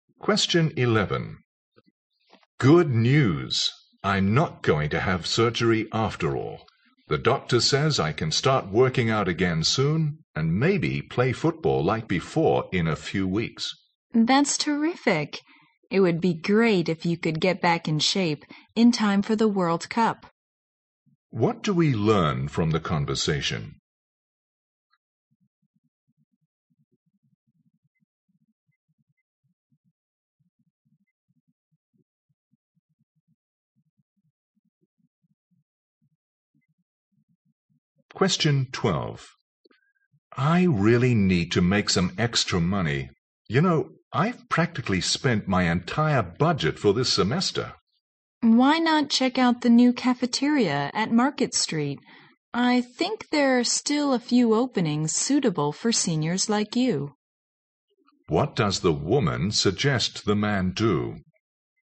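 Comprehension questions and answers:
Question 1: What do we learn from the conversation?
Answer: The man might be able to play in the World Cup.

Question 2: What does the woman suggest the man do?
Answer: Solve his problem by doing a part-time job.

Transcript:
M: Good news! I am not going to have surgery after all. The doctor says I can start working out again soon and maybe play football like before in a few weeks.
W: That's terrific. It will be great if you could get back in shape in time for the World's Cup.
Q: What do we learn from the conversation?
M: I really need to make some extra money. You know, I've practically spent my entire budget for this semester.
W: Why not check out the new cafeteria at Market Street? I think there are still a few opening suitable for seniors like you.
Q: What does the woman suggest the man do?

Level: 六级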